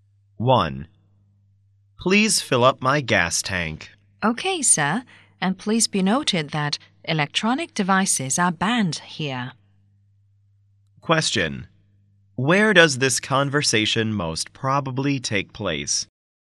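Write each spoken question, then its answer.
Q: Where does this conversation most probably take place?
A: At a gas station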